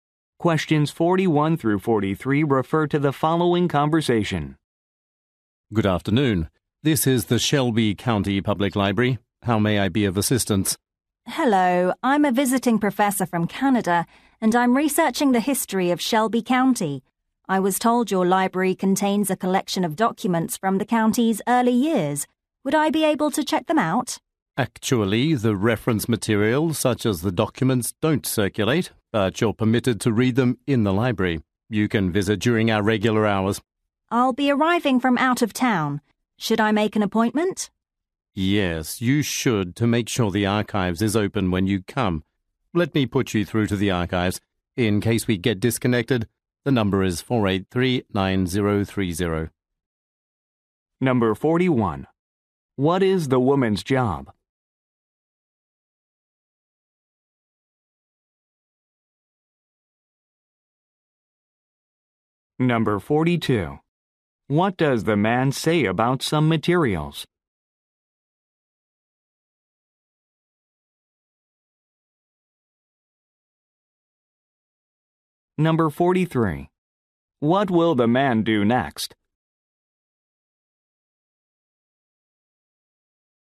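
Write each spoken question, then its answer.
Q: What does the man say about some materials?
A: They can't be checked out but can be read in the library.

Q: What will the man do next?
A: Transfer the call to the archives.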